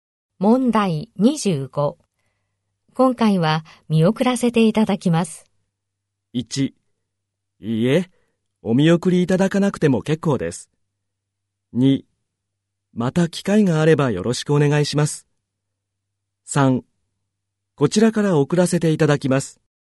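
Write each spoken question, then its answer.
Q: 今回は見送らせていただきます。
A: 2: また機会があればよろしくお願いします。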